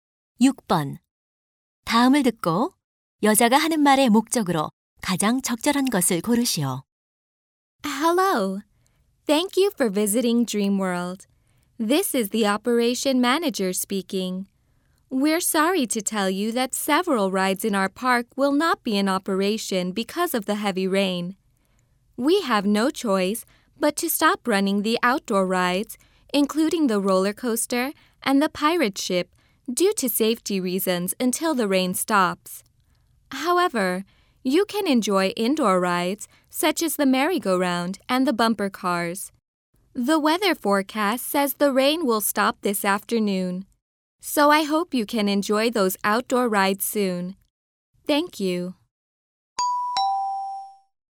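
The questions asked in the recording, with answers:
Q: 다음을 듣고 여자가 하는 말의 목적으로 가장 적절한 것을 고르시오.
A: 비 때문에 야외 놀이기구 운행 중단을 안내하려고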